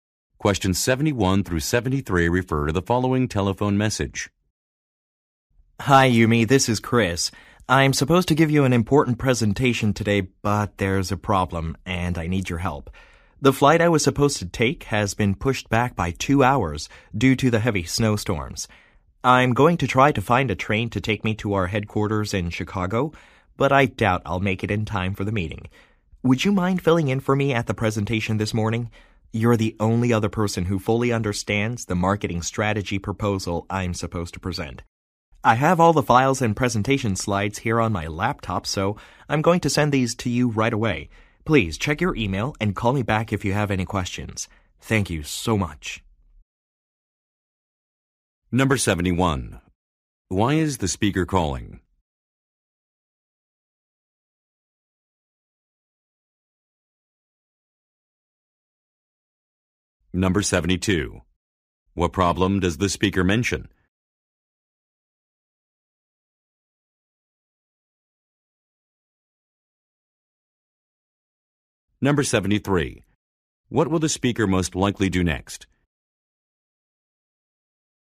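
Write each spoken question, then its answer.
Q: Why is the speaker calling?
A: To ask Yumi to give the presentation for him

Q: What problem does the speaker mention?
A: His flight was delayed by 2 hours because of a snowstorm

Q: What will the speaker most likely do next?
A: Send the files and slides by email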